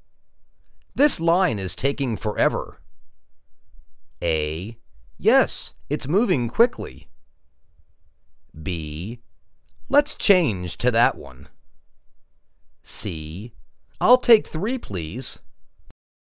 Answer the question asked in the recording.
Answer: Let's change to that one.